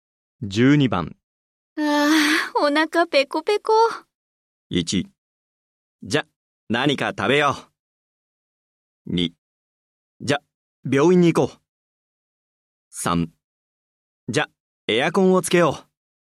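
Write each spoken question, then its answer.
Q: ああ、お腹ペコペコ。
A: 1: じゃ、何か食べよう。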